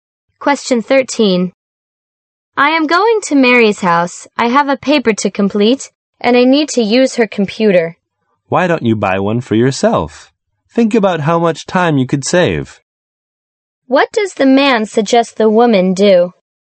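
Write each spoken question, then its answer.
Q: What does the man suggest the woman do?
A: Buy her own computer.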